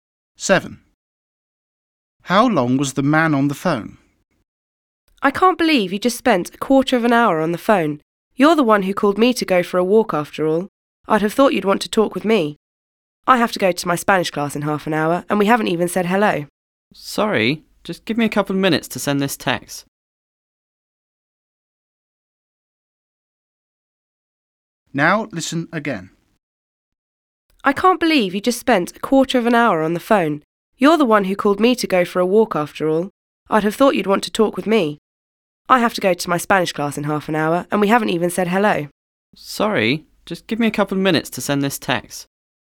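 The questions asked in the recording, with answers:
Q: How long was the man on the phone?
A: a quarter of an hour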